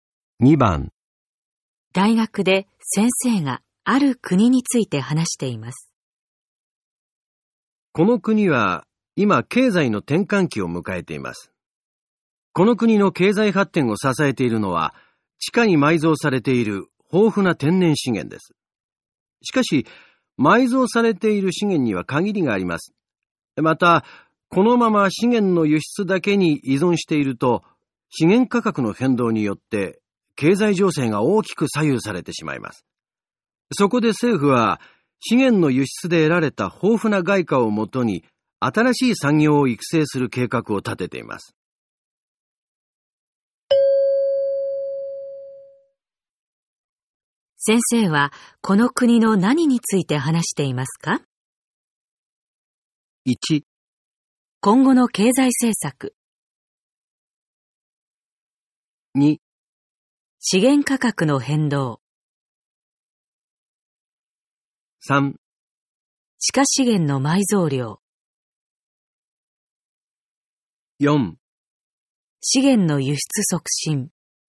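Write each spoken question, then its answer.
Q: 先生はこの国の何について話していますか?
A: 1: 今後の経済政策。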